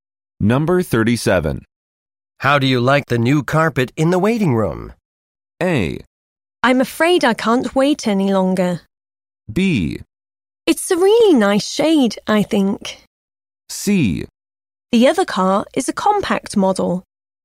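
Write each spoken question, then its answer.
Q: How do you like the new carpet in the waiting room?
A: B: It's a really nice shade, I think.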